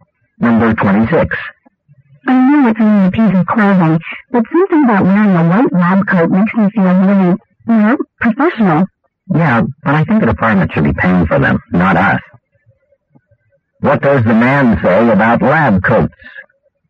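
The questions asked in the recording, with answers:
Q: What does the man say about lab coats?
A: The department should pay for them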